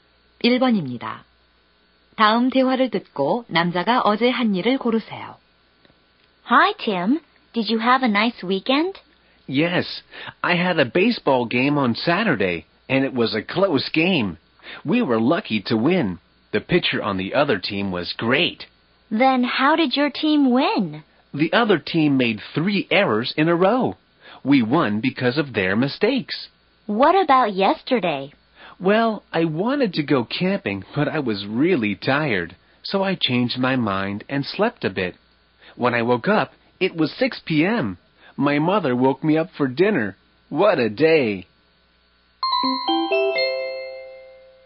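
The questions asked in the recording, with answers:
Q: 다음 대화를 듣고 남자가 어제 한 일을 고르세요.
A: 낮잠을 잤다 (캠핑을 가려다 피곤해서 잠)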